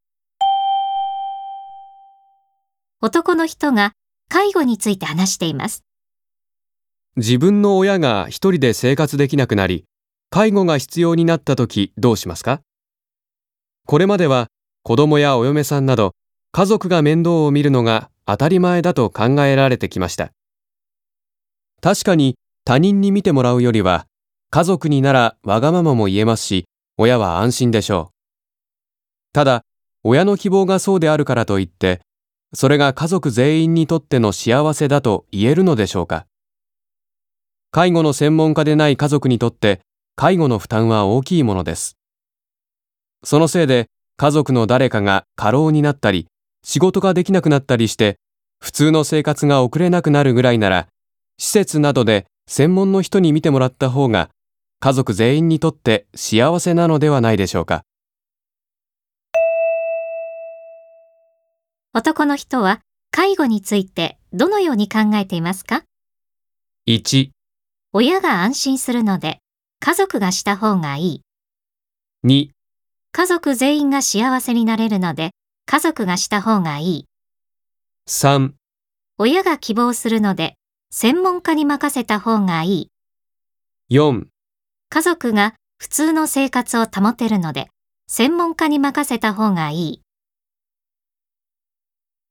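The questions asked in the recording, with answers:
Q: 男の人は介護についてどのように考えていますか?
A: 4: 家族が普通の生活を保てるので専門家に任せた方がいい。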